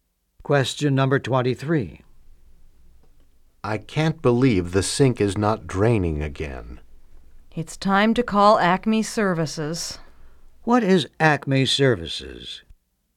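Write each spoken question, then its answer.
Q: What is Acme Services?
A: A plumbing service.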